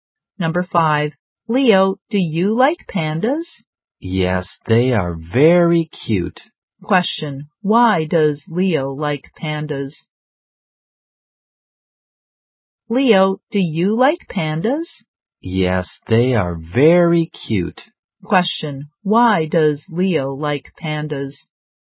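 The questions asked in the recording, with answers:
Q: Why does Leo like pandas?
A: They are very cute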